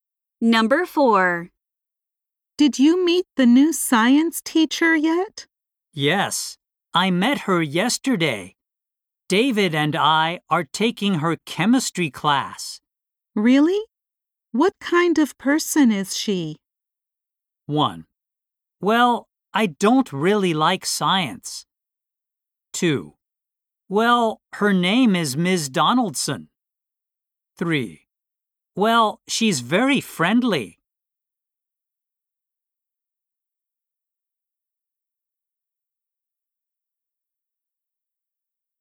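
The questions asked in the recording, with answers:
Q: Really? What kind of person is she?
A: 3: Well, she's very friendly.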